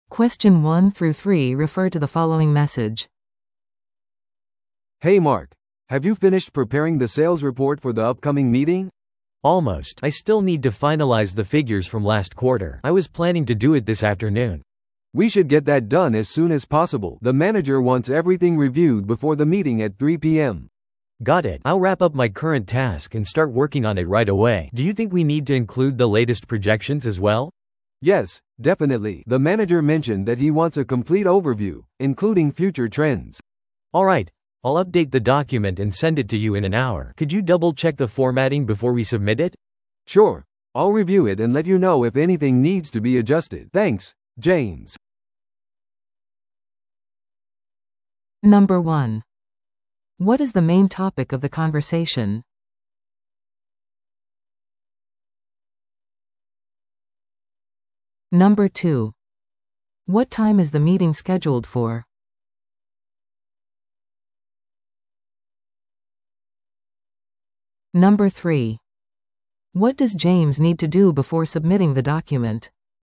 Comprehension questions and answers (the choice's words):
Listen to the audio below and answer the questions.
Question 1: What is the main topic of the conversation?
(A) クライアント向けの提案書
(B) 販売報告書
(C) 予算の見直し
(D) チームミーティング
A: 販売報告書

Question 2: What time is the meeting scheduled for?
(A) 午前10時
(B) 午後1時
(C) 午後3時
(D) 午後5時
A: 午後3時

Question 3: What does James need to do before submitting the document?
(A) フォーマットを確認する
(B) 最新の予測を追加する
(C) マネージャーの承認を得る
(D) 報告書を印刷する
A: フォーマットを確認する

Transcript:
A: "Hey Mark, have you finished preparing the sales report for the upcoming meeting?"
B: "Almost.
I still need to finalize the figures from last quarter. I was planning to do it this afternoon."
A: "We should get that done as soon as possible. The manager wants everything reviewed before the meeting at 3 PM."
B: "Got it. I'll wrap up my current task and start working on it right away. Do you think we need to include the latest projections as well?"
A: "Yes, definitely. The manager mentioned that he wants a complete overview, including future trends."
B: "Alright, I'll update the document and send it to you in an hour. Could you double-check the formatting before we submit it?"
A: "Sure, I'll review it and let you know if anything needs to be adjusted. Thanks, James."